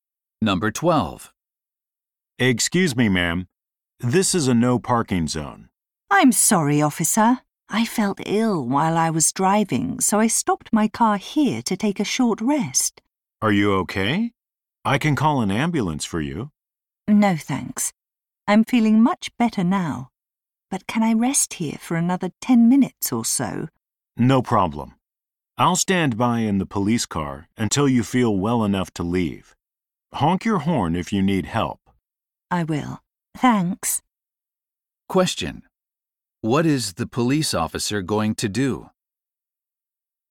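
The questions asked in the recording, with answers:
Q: Question: What is the police officer going to do?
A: Wait in the police car until she feels well enough to leave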